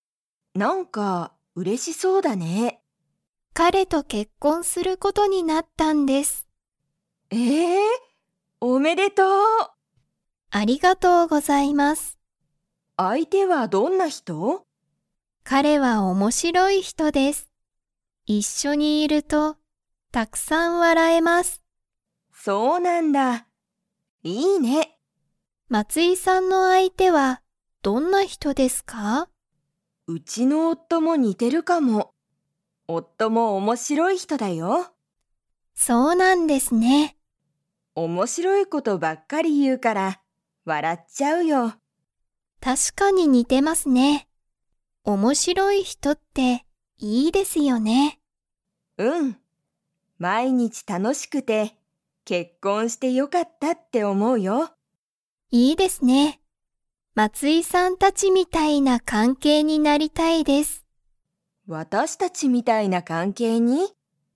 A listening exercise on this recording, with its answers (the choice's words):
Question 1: 山田(やまだ)さんの彼(かれ)はどんな人(ひと)ですか?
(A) 怖(こわ)い人(ひと)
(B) 可愛(かわい)い人(ひと)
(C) 面白(おもしろ)い人(ひと)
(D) 頭(あたま)がいい人(ひと)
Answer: 面白(おもしろ)い人(ひと)

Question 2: 山田(やまだ)さんは、松井(まつい)さんたちみたいな関係(かんけい)に 。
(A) なりたい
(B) なりたくない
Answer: なりたい

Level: Level 3